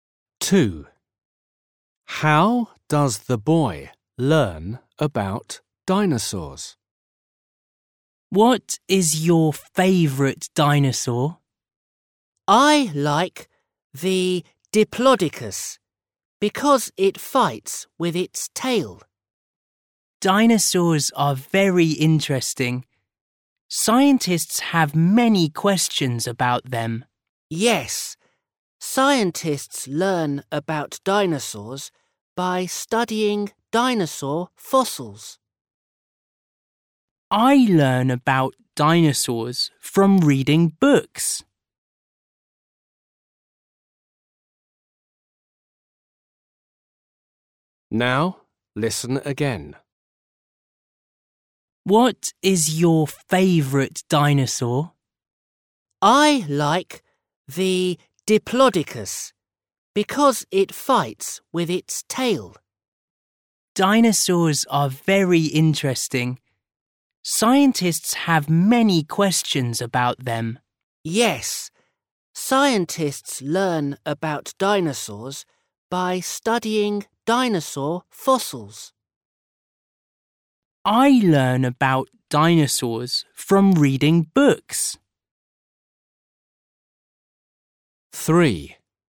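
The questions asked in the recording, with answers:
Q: How does the boy learn about dinosaurs?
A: from reading books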